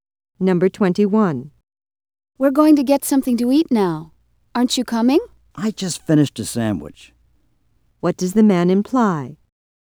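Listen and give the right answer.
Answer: He isn't hungry, so he won't go with them.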